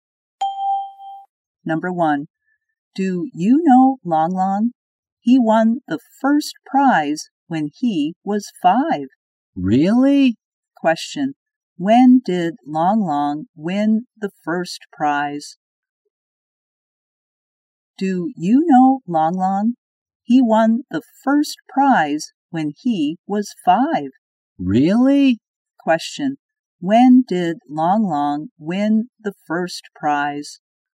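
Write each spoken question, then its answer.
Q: when did Long Long win the first prize?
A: When he was 5.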